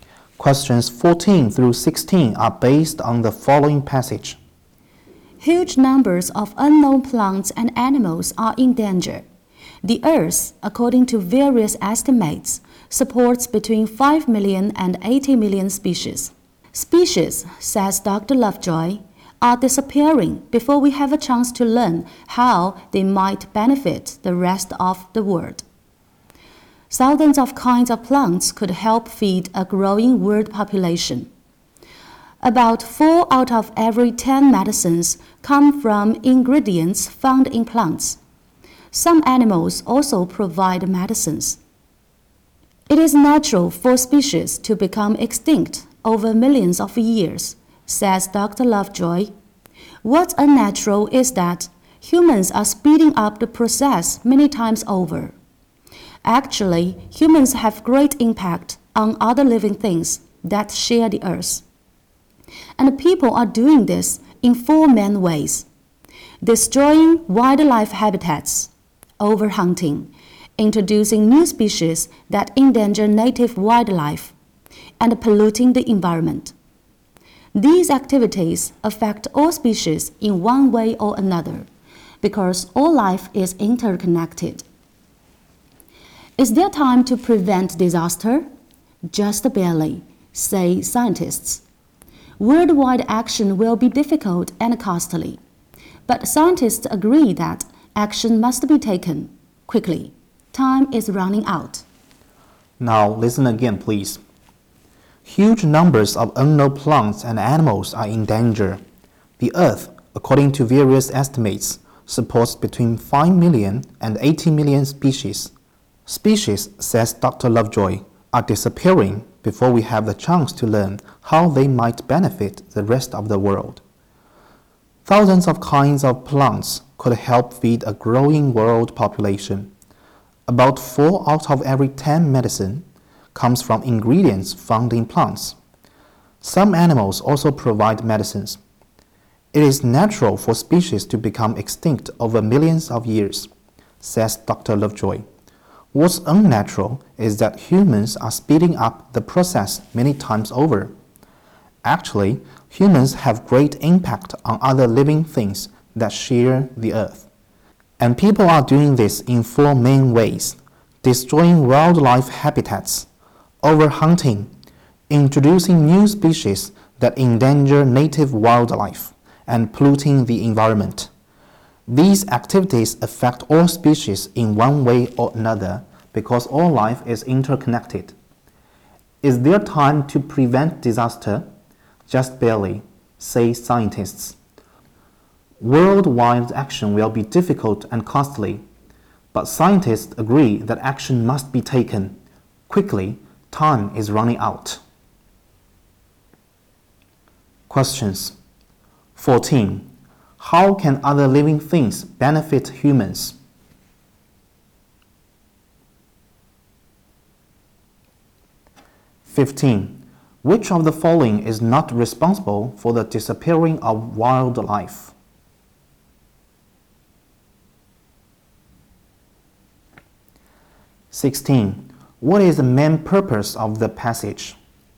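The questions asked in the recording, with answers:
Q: How can other living things benefit humans?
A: By providing food and medicines

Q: What is the main purpose of the passage?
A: To call for quick action to protect endangered species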